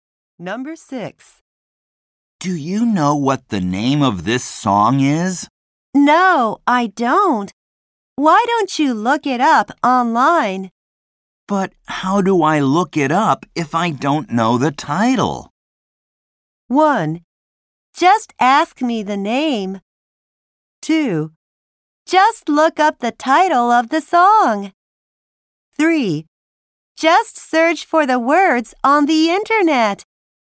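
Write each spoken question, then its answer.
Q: But how do I look it up if I don't know the title?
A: 3: Just search for the words on the internet.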